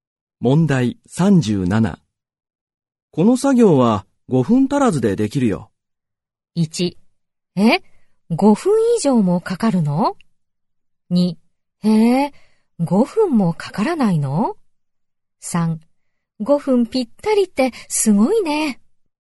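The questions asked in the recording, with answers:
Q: この作業は5分足らずでできるよ。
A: 2: へえ、5分もかからないの?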